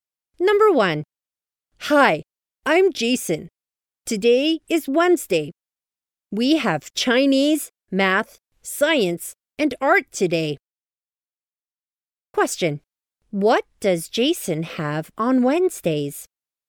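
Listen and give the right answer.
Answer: Chinese, math, science, and art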